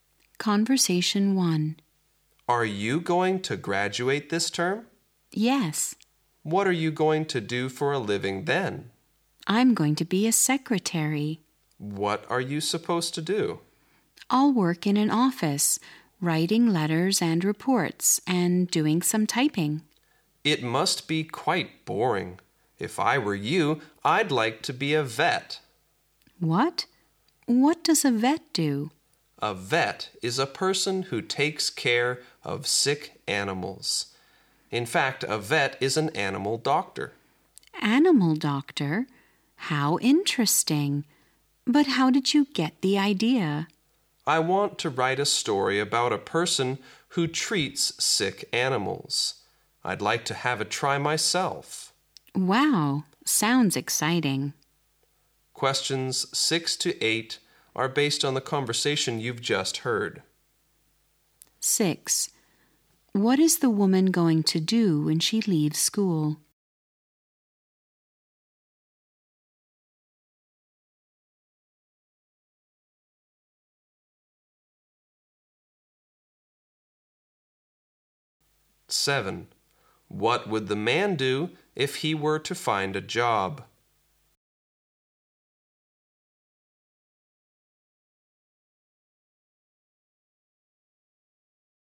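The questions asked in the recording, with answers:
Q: 6. What is the woman going to do when she leaves school?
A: Be a secretary

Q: Seven. What would the man do if he were to find a job?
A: Be a vet (animal doctor)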